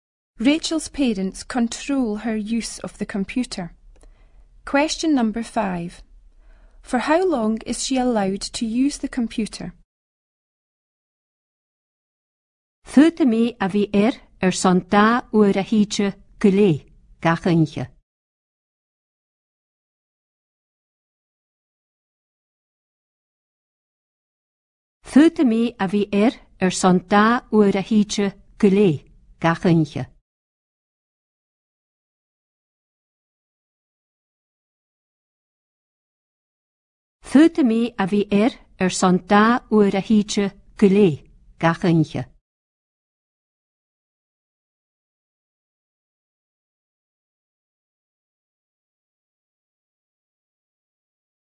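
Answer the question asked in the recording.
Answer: Two hours each night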